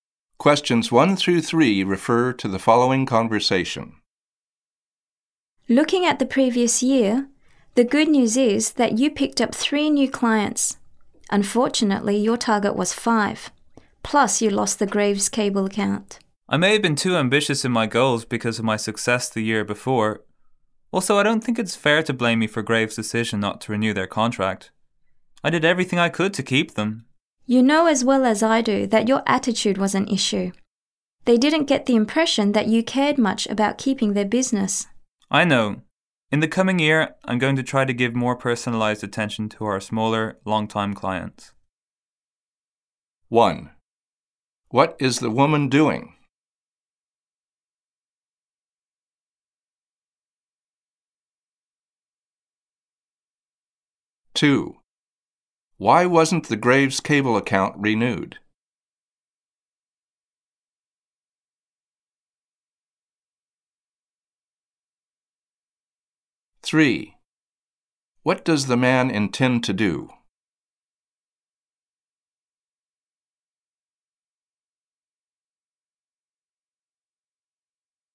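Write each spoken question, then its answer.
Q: What is the woman doing?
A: Reviewing the man's performance over the past year

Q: Why wasn't the Graves Cable account renewed?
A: The client felt the man didn't care much about keeping their business (his attitude)

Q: What does the man intend to do?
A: Give more personalized attention to smaller, long-time clients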